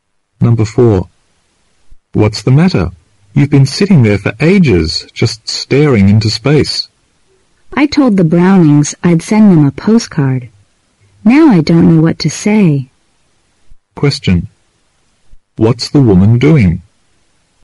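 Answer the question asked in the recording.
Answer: Trying to think of what to write on a postcard to the Brownings.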